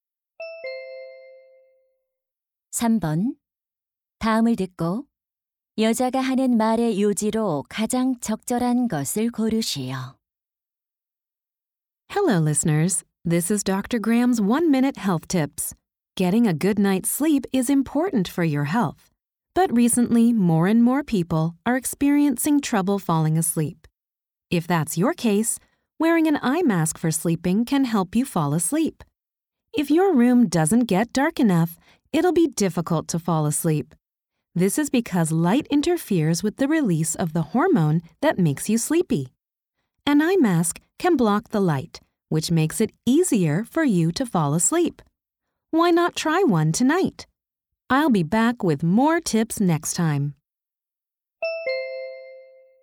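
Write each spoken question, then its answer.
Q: 다음을 듣고 여자가 하는 말의 요지로 가장 적절한 것을 고르시오.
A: 수면 안대를 쓰면 잠드는 데 도움이 된다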